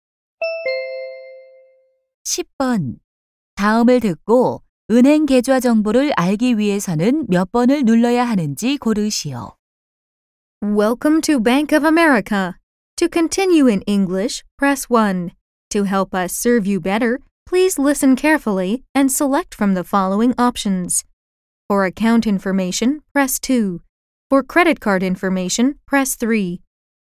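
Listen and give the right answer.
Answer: 2번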